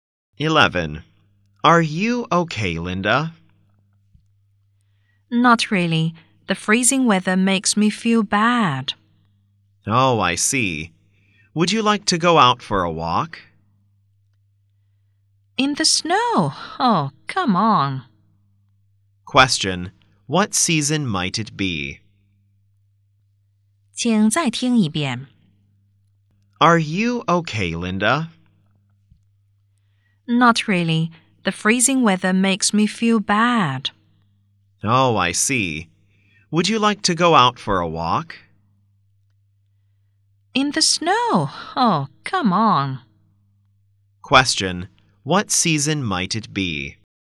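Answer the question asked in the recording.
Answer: Winter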